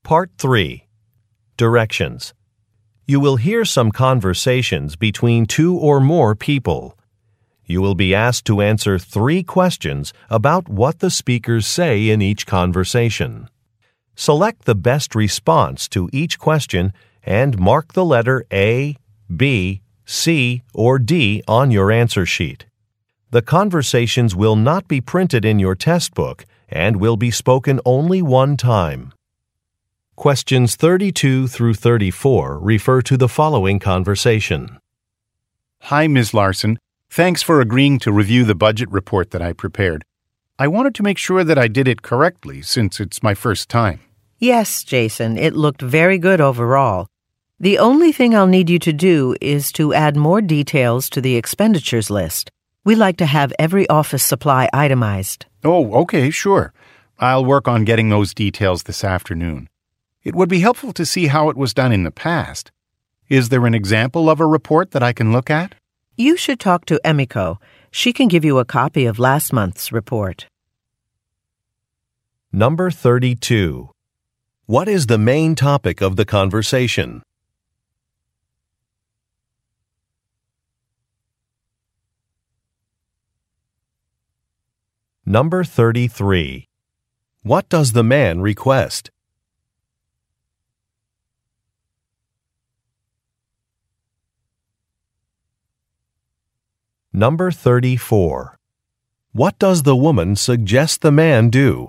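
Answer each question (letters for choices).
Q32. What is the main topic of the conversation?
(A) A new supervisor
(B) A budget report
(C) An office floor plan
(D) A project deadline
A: B

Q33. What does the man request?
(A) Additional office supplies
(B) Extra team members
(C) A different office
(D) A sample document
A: D

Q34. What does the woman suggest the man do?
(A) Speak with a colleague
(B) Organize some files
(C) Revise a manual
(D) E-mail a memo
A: A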